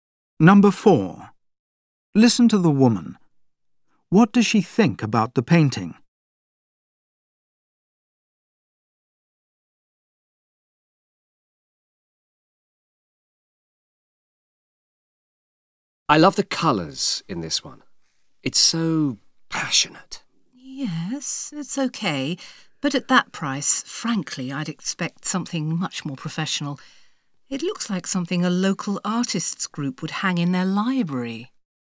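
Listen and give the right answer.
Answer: It's too expensive for something so amateurish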